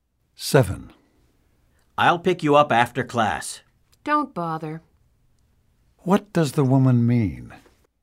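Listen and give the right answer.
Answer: The man doesn't need to pick her up.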